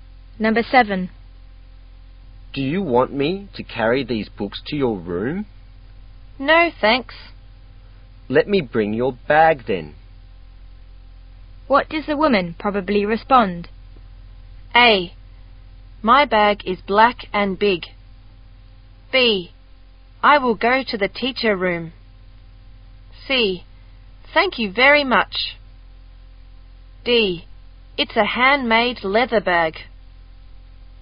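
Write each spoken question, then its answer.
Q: What does the woman probably respond?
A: C: Thank you very much.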